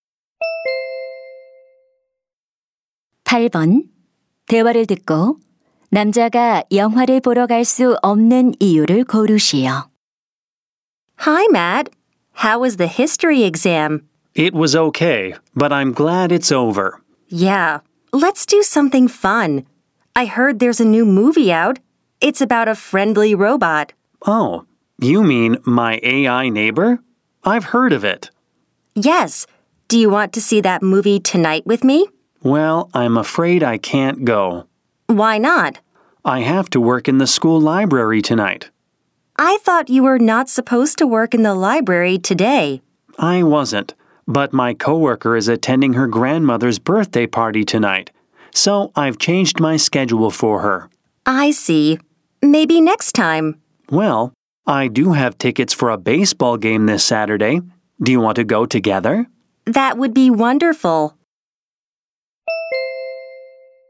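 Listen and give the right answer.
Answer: 동료 대신 학교 도서관에서 일해야 해서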